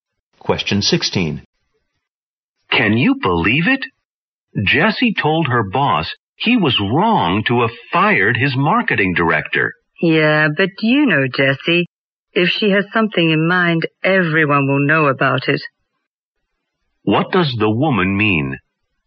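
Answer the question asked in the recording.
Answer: Jessie always says what she thinks.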